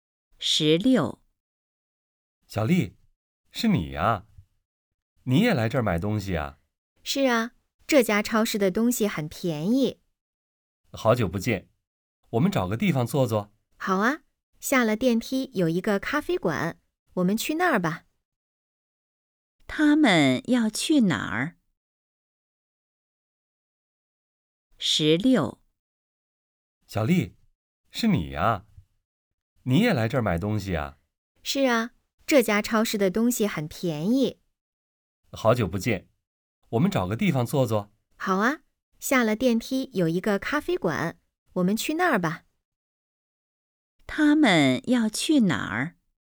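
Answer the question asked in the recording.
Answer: 咖啡馆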